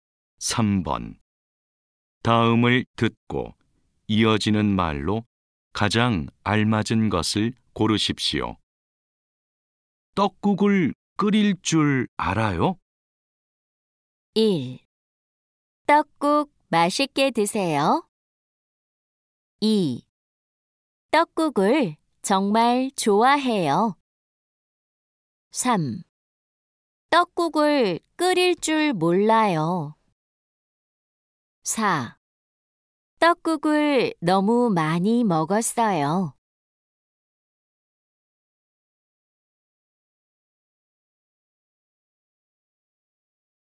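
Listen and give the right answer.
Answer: 3: 떡국을 끓일 줄 몰라요.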